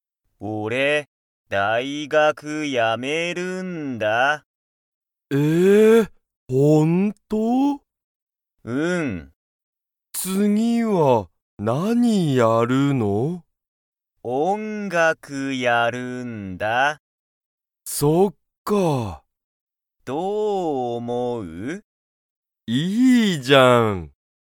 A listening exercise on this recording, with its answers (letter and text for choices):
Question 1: タカシは大学だいがくをやめて、 をやる。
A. 音楽(おんがく)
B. 仕事(しごと)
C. 先生(せんせい)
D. 英語えいご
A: A. 音楽(おんがく)

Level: Level 1